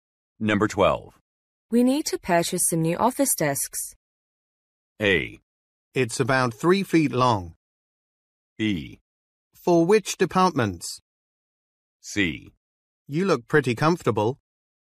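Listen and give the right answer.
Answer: B: For which departments?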